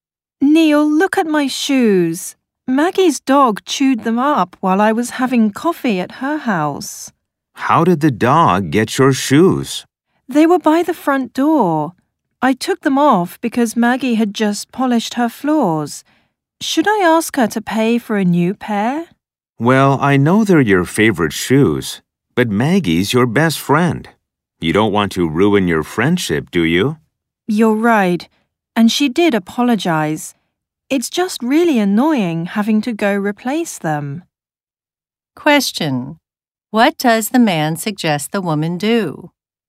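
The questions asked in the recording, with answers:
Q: What does the man suggest the woman do?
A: Not ask Maggie to pay for new shoes, to protect their friendship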